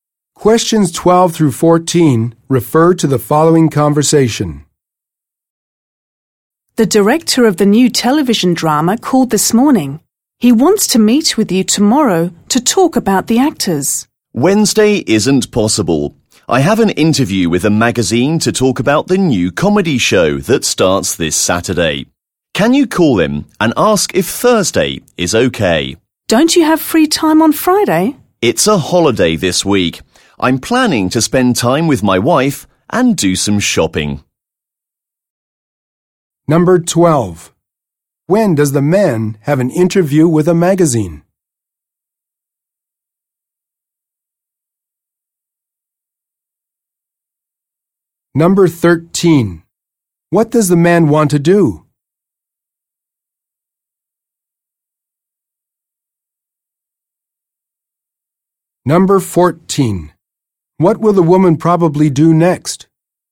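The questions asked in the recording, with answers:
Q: When does the man have an interview with a magazine?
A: Wednesday

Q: What does the man want to do?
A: Meet the director on Thursday instead

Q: What will the woman probably do next?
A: Call the director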